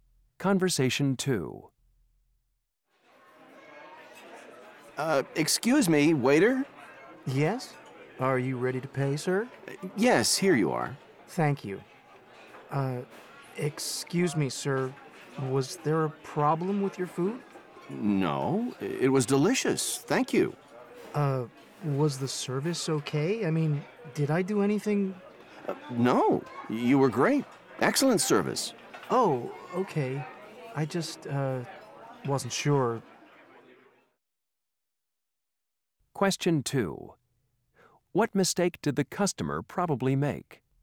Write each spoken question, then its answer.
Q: What mistake did the customer probably make?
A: Oh, I almost forgot. Here's your tip.